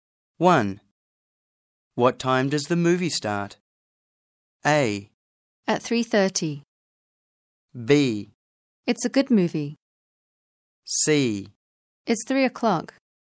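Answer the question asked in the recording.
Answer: A: At 3:30.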